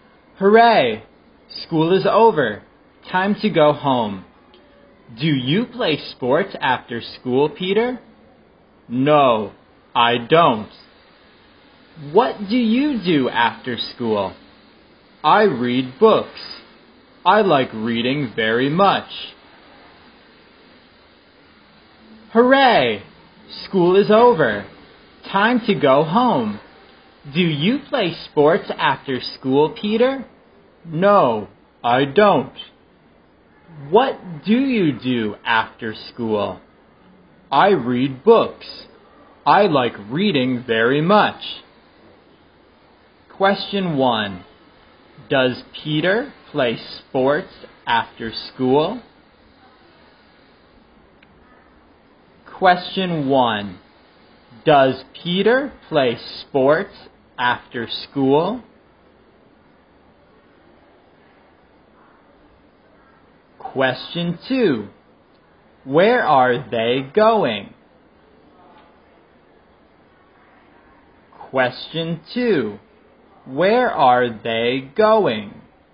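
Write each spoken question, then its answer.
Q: Does Peter play sports after school?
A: No, he doesn't.

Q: Where are they going?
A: Home.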